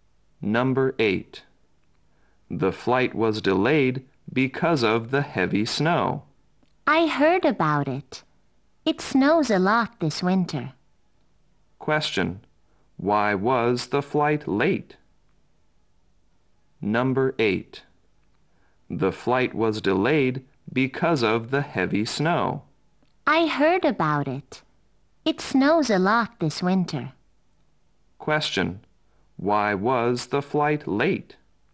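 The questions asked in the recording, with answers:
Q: Why was the flight late?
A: Because of the heavy snow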